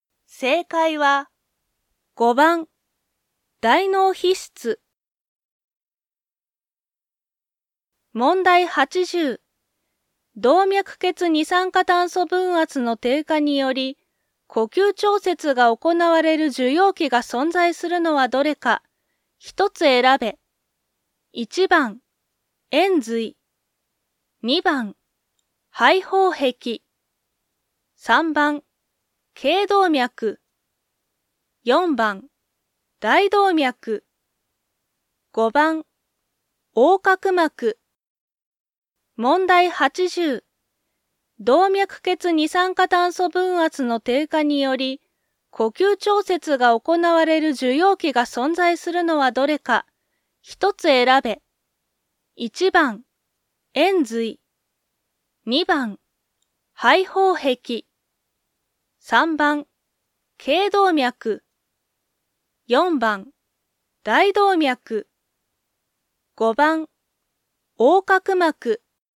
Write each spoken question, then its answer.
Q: 動脈血二酸化炭素分圧の低下により、呼吸調節が行われる受容器が存在するのはどれか、一つ選べ。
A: 1番、延髄。